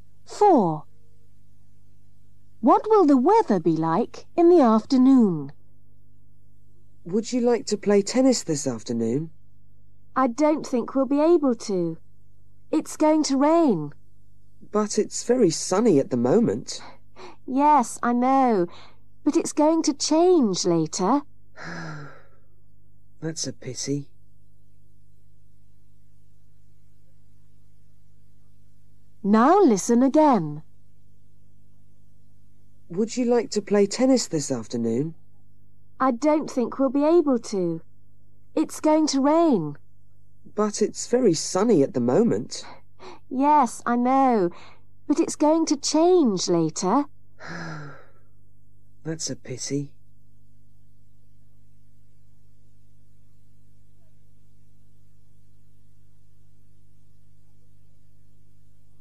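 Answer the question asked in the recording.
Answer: Rainy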